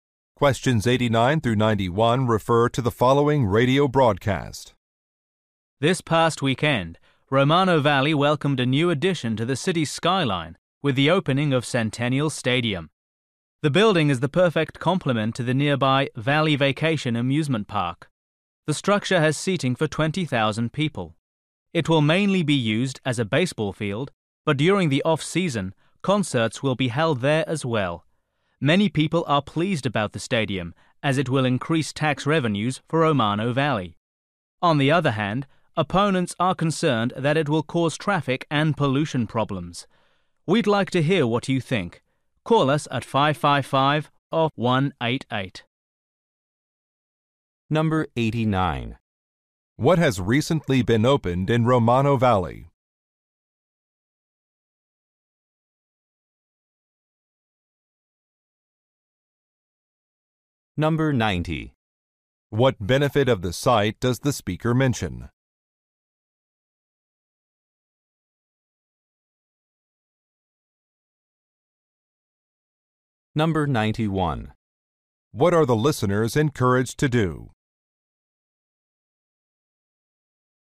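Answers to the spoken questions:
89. A stadium
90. Increased tax revenues
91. Call in with their opinions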